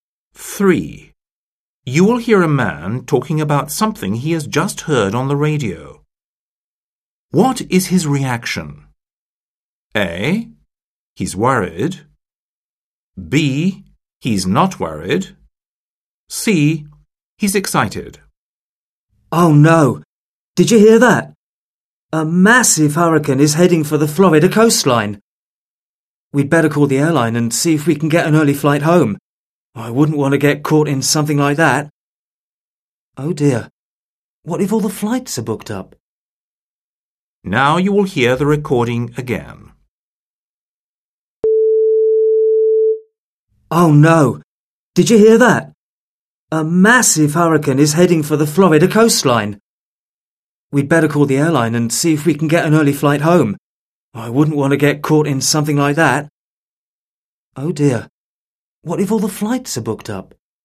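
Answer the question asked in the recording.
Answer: A: He's worried.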